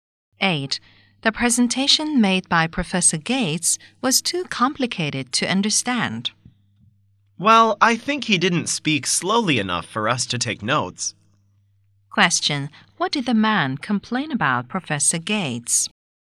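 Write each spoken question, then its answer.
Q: What did the man complain about Professor Gates?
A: He spoke too fast to take notes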